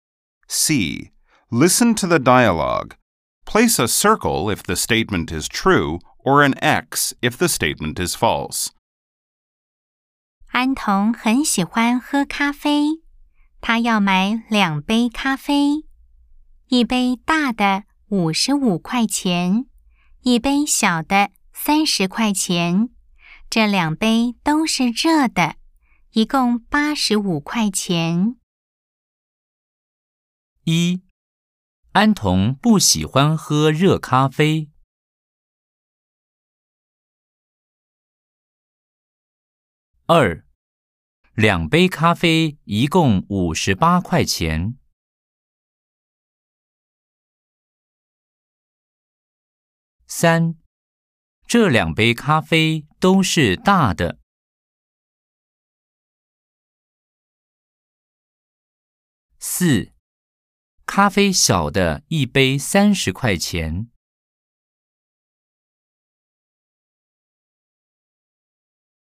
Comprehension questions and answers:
C. Nghe đoạn hội thoại. Đánh dấu ⭕ nếu đúng, ✖ nếu sai. 🎧 04-4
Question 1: 安同不喜歡喝熱咖啡。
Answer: X

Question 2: 兩杯咖啡一共五十八塊錢。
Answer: X

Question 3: 這兩杯咖啡都是大的。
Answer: X

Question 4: 咖啡小的一杯三十塊錢。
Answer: O

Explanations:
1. Sai: An Đồng thích cà phê nóng. 兩杯咖啡一共五十八塊錢。
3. Sai: Có một cốc nhỏ, một cốc lớn.